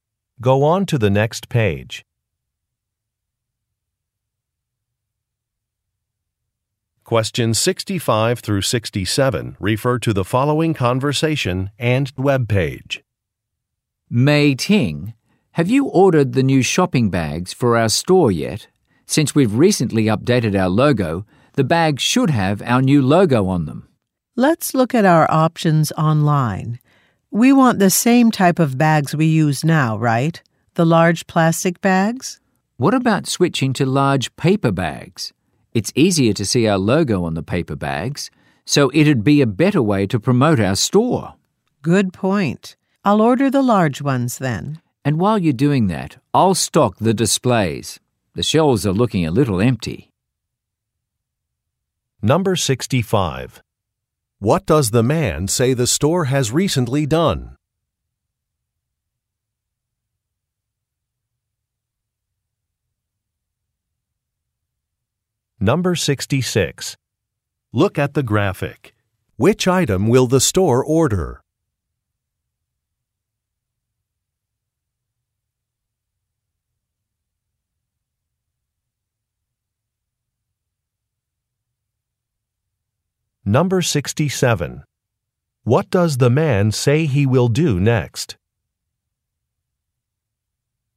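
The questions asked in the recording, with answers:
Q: What does the man say the store has recently done?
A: Updated its logo

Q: What does the man say he will do next?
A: Stock the displays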